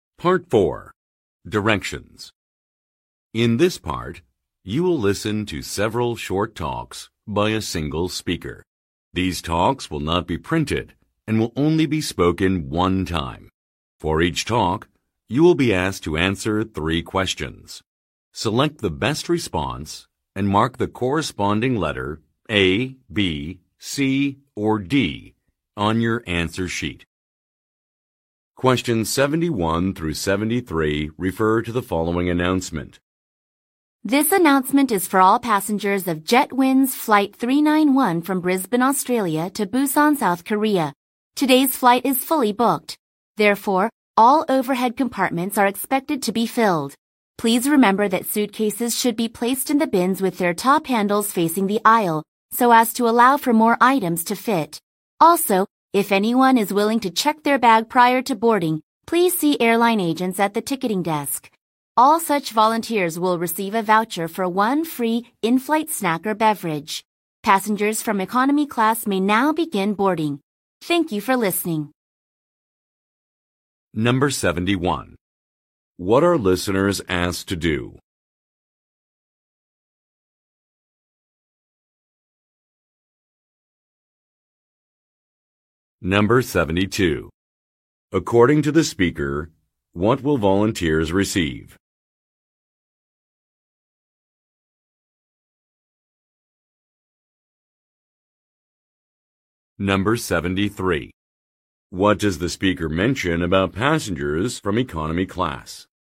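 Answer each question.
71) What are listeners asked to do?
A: Arrange bags in a specific way

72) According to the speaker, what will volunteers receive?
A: A coupon for food

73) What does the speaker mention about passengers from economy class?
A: They can get onto an aircraft.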